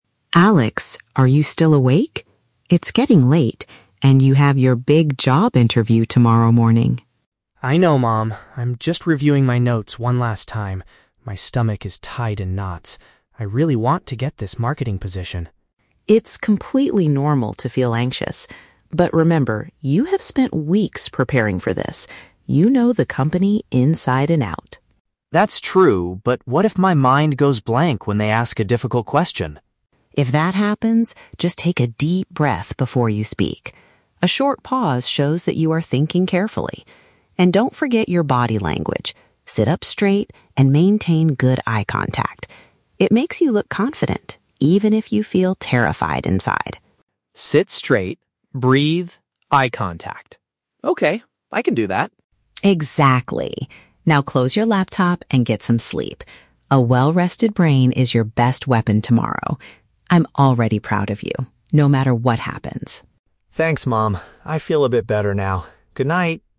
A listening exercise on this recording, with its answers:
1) Why is Alex staying up late?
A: He is feeling nervous and looking over his study materials.

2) What does the mother suggest Alex do if he faces a tough question?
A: Inhale slowly to give himself time to think.

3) According to the mother, what is the benefit of maintaining good posture and eye contact?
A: It creates a strong impression of self-assurance.

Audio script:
Mom: Alex, are you still awake? It's getting late, and you have your big job interview tomorrow morning.
Alex: I know, Mom. I'm just reviewing my notes one last time. My stomach is tied in knots. I really want to get this marketing position.
Mom: It's completely normal to feel anxious. But remember, you have spent weeks preparing for this. You know the company inside and out.
Alex: That's true, but what if my mind goes blank when they ask a difficult question?
Mom: If that happens, just take a deep breath before you speak. A short pause shows that you are thinking carefully. And don't forget your body language—sit up straight and maintain good eye contact. It makes you look confident, even if you feel terrified inside.
Alex: Sit straight, breathe, eye contact. Okay, I can do that.
Mom: Exactly. Now, close your laptop and get some sleep. A well-rested brain is your best weapon tomorrow. I'm already proud of you, no matter what happens.